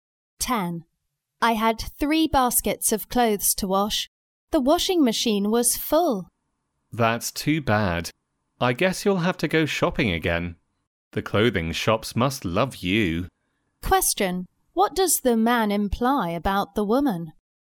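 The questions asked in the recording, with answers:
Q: What does the man imply about the woman?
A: She buys too many clothes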